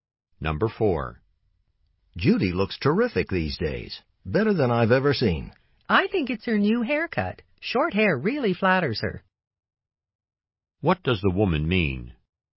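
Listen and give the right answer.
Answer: Judy's new short haircut makes her look great.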